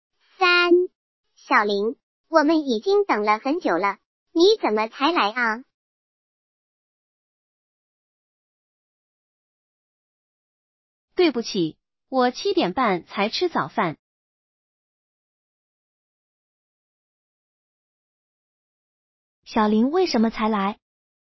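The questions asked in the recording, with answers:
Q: 小林为什么才来?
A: 他七点半才吃早饭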